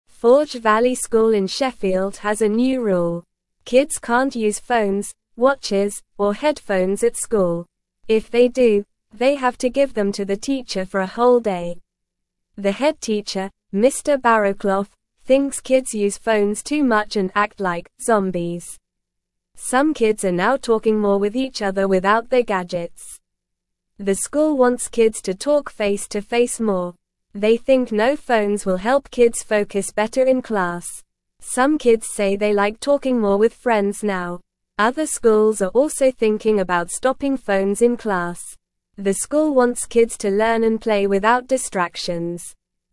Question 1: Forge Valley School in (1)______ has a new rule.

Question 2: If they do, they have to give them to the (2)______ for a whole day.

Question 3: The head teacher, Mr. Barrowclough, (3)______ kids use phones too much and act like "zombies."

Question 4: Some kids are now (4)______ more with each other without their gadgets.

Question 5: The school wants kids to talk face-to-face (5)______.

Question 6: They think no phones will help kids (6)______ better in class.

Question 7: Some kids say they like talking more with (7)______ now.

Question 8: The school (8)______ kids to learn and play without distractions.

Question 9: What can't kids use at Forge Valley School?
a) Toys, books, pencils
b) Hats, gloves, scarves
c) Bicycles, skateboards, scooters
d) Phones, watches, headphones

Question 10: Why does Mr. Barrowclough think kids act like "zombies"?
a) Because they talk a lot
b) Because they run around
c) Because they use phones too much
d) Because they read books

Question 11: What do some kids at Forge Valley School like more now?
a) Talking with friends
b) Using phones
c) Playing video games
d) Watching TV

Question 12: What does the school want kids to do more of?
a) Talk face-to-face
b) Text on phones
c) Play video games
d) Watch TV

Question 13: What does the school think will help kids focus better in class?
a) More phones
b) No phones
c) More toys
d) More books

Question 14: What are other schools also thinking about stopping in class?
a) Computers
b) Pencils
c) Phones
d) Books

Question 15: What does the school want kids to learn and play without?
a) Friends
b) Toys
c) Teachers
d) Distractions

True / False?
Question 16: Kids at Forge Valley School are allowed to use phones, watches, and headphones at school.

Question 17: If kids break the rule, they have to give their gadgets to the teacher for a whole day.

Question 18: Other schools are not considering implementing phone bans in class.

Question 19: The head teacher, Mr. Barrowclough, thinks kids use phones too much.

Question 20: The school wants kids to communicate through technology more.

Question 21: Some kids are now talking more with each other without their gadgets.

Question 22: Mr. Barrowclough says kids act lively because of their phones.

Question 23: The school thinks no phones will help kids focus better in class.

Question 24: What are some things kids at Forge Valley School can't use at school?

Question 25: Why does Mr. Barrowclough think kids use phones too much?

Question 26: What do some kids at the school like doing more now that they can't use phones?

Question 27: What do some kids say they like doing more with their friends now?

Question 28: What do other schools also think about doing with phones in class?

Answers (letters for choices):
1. Sheffield
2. teacher
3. thinks
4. talking
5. more
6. focus
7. friends
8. wants
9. d
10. c
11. a
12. a
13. b
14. c
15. d
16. False
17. True
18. False
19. True
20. False
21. True
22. False
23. True
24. Kids at Forge Valley School can't use phones, watches, or headphones at school.
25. Mr. Barrowclough thinks kids use phones too much and act like "zombies."
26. Some kids at the school like talking more with their friends now that they can't use phones.
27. Some kids say they like talking more with their friends now that they can't use phones.
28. Other schools are also thinking about stopping phones in class.

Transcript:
Forge Valley School in Sheffield has a new rule. Kids can't use phones, watches, or headphones at school. If they do, they have to give them to the teacher for a whole day. The head teacher, Mr. Barrowclough, thinks kids use phones too much and act like "zombies." Some kids are now talking more with each other without their gadgets.
The school wants kids to talk face-to-face more. They think no phones will help kids focus better in class. Some kids say they like talking more with friends now. Other schools are also thinking about stopping phones in class. The school wants kids to learn and play without distractions.

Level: Level 1